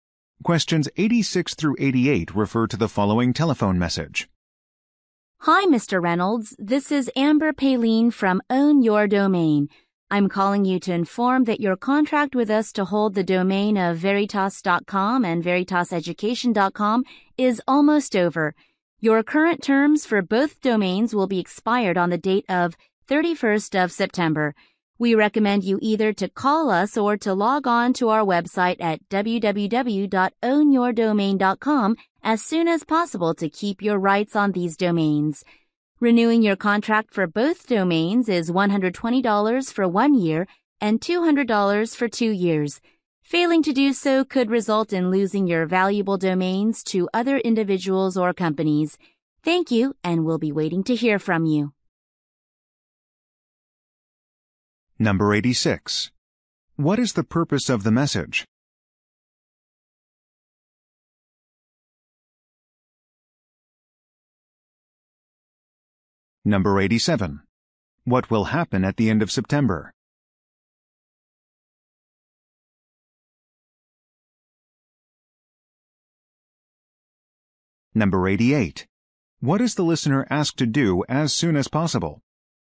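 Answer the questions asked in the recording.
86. To say the domain contract is almost over
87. The domain terms will expire
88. Call or log on to the website to renew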